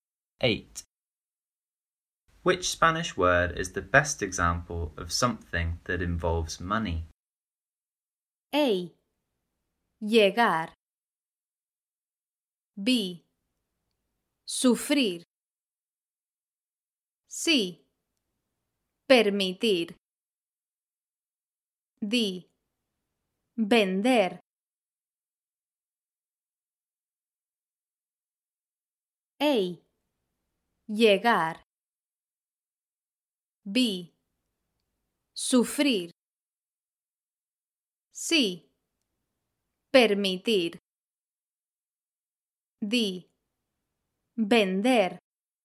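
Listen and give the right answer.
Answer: D: Vender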